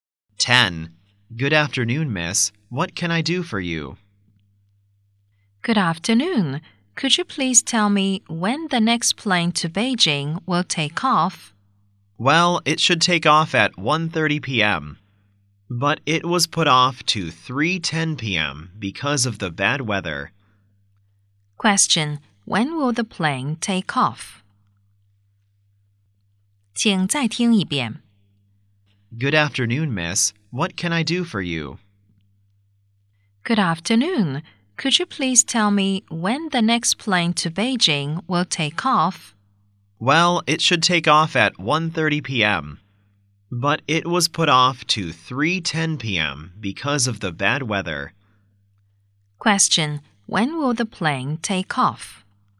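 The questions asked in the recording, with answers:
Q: Question: When will the plane take off?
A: At 3:10 p.m.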